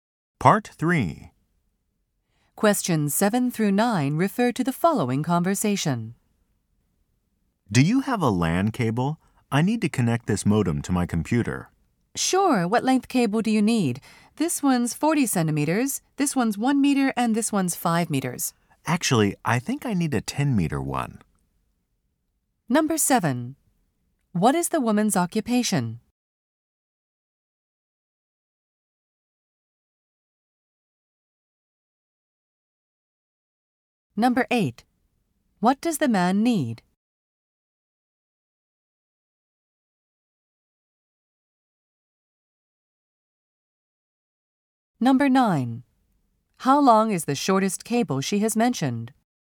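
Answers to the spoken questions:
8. A 10-meter LAN cable
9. 40 centimeters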